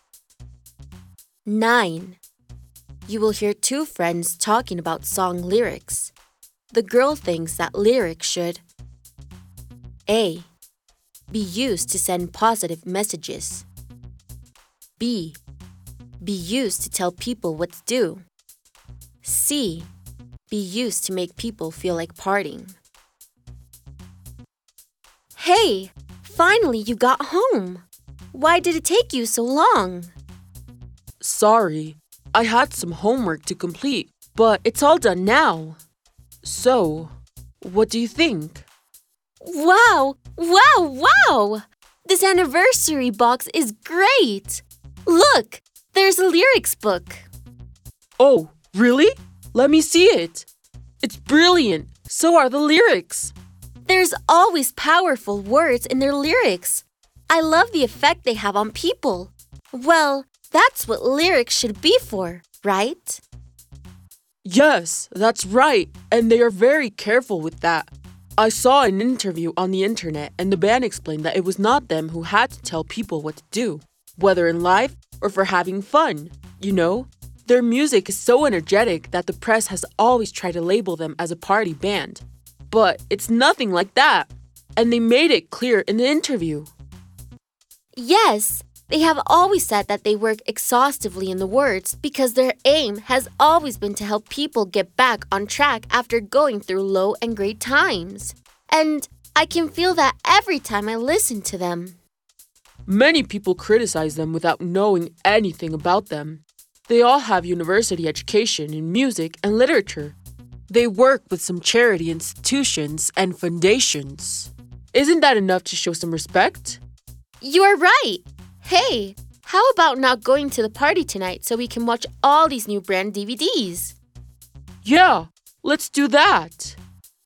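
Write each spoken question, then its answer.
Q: The girl thinks that lyrics should A.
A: A: Be used to send positive messages.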